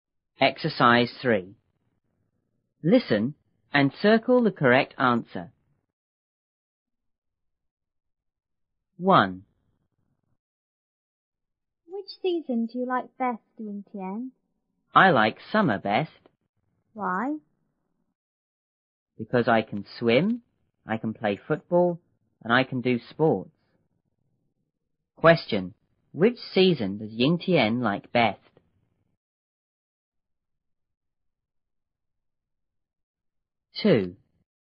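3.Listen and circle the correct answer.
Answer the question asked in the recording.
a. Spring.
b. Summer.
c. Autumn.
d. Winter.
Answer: b. Summer.

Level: 六年级下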